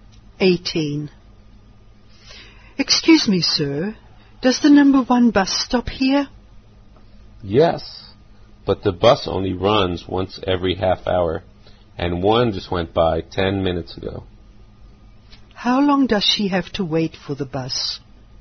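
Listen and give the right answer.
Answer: 20 minutes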